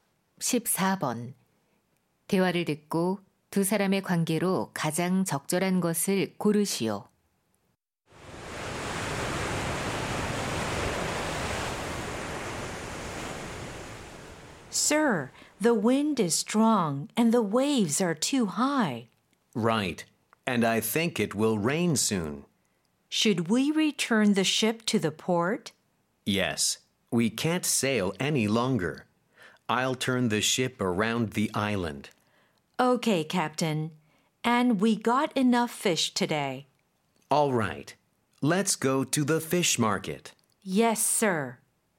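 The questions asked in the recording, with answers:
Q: 대화를 듣고 두 사람의 관계로 가장 적절한 것을 고르시오.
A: 선장과 선원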